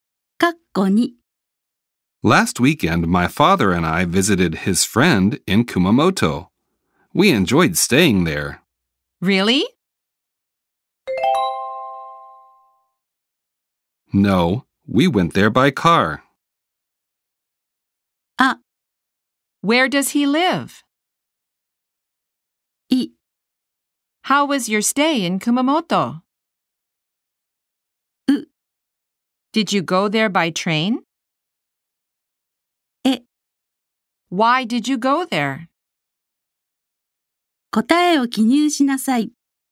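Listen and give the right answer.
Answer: う: Did you go there by train?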